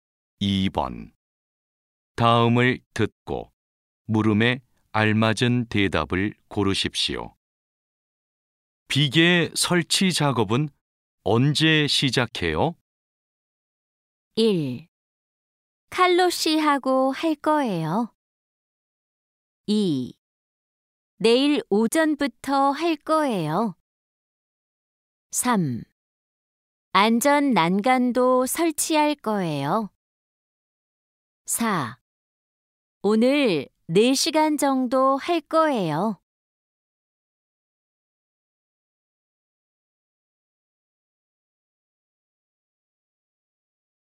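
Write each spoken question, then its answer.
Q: 비계 설치 작업은 언제 시작해요?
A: 2: 내일 오전부터 할 거예요.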